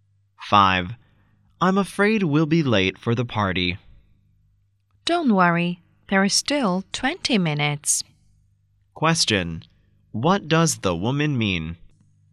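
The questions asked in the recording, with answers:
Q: What does the woman mean?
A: They won't be late; there are still 20 minutes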